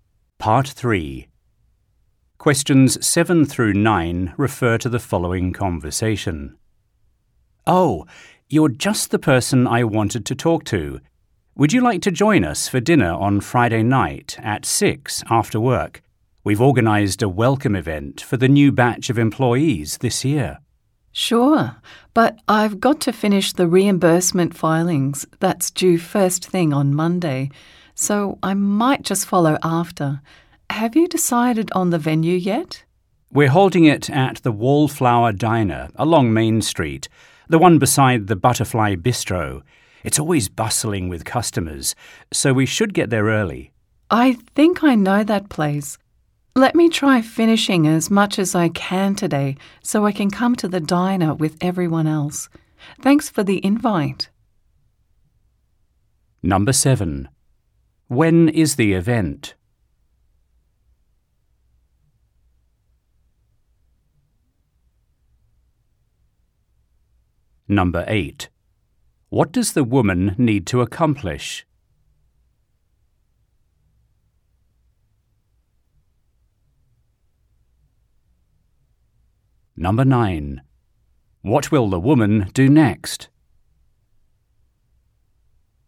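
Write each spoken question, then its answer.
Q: When is the event?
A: Friday night at 6

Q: What does the woman need to accomplish?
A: Finish the reimbursement filings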